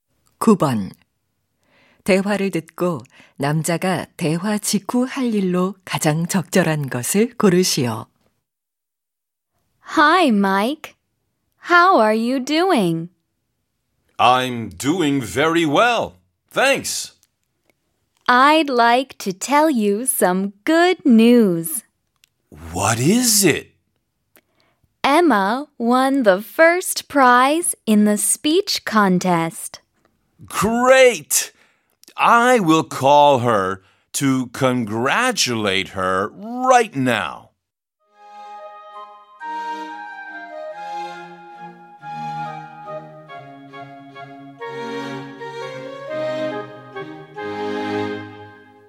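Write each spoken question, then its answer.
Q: 대화를 듣고 남자가 대화 직후 할 일로 가장 적절한 것을 고르시오.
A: Emma에게 축하 전화하기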